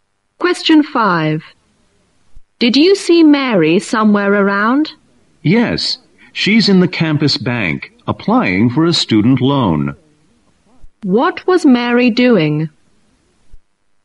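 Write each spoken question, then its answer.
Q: What was Mary doing?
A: Applying for a student loan at the campus bank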